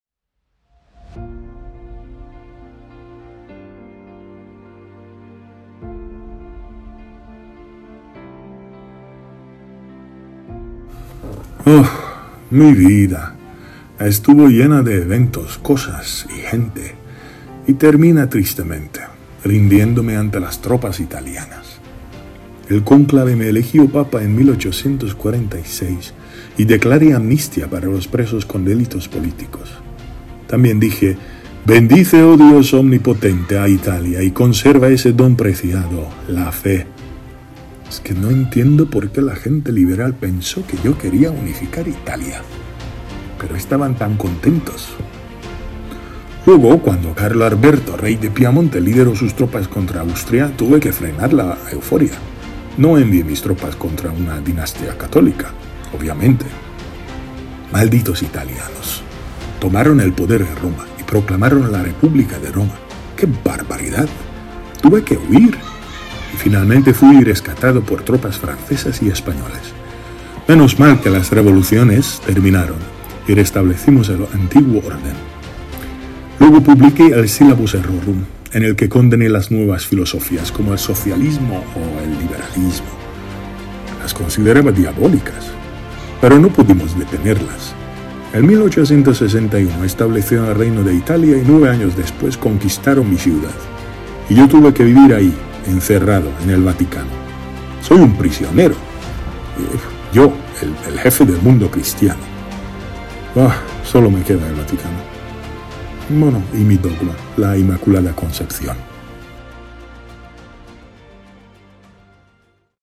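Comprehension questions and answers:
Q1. ¿Cómo reaccionó el papa cuando las tropas italianas conquistaron Roma?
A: Se rindió con tristeza y se quedó encerrado en el Vaticano, sintiéndose prisionero.

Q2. ¿Cuál papa proclamó el dogma de la Inmaculada Concepción?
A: Pío IX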